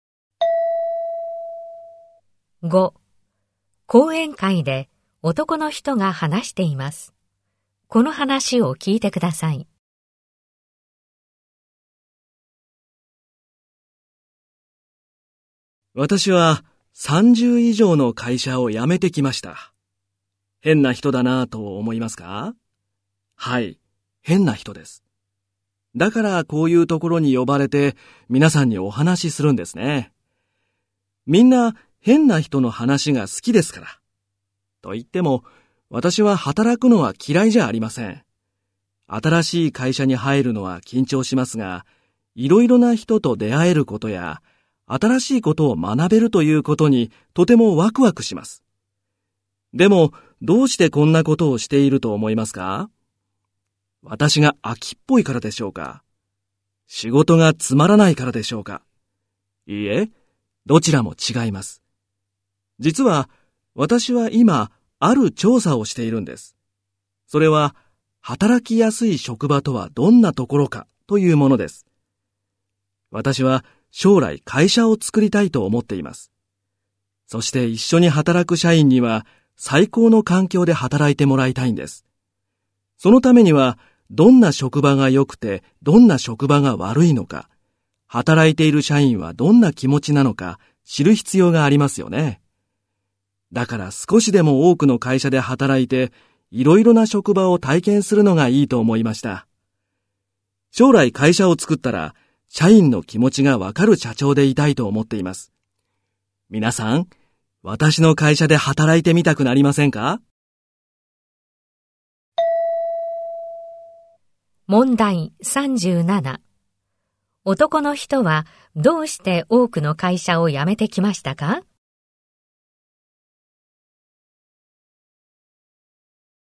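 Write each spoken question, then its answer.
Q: 男の人はどうして多くの会社を辞めてきましたか?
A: 働きやすい職場とはどんなところか調査するため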